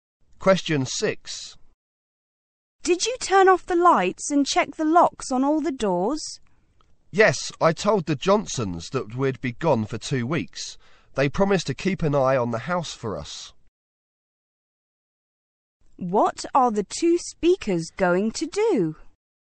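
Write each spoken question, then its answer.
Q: What are the two speakers going to do?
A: Go away on a two-week trip.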